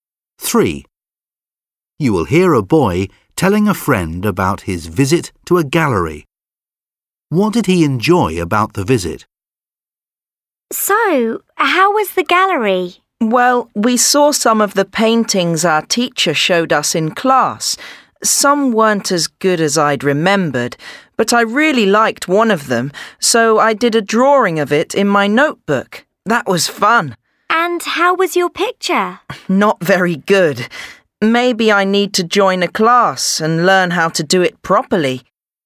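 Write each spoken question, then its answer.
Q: What did he enjoy about the visit?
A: Doing a drawing of a painting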